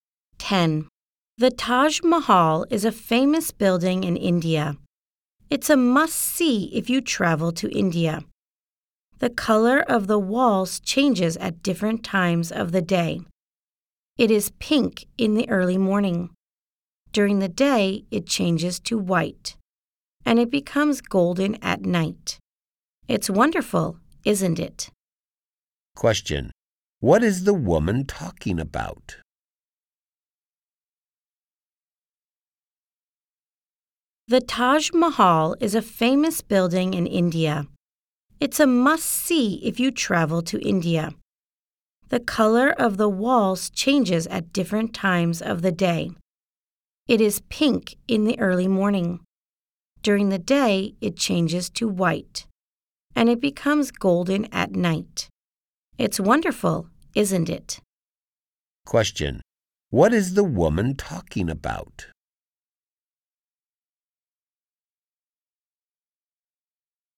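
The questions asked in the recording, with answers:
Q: What is the woman talking about?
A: The Taj Mahal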